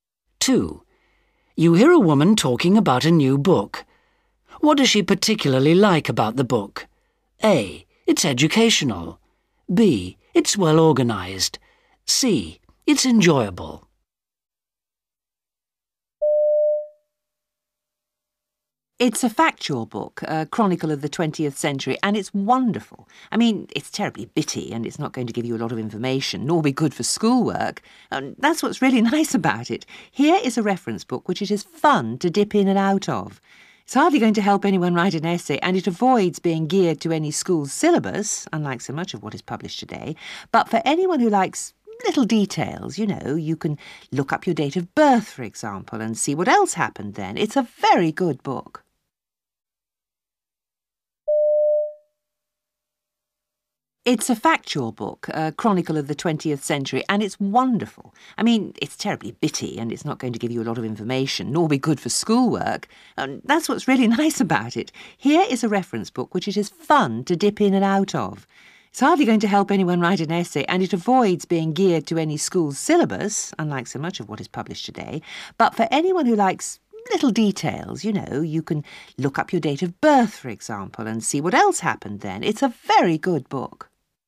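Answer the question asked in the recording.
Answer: C: It's enjoyable.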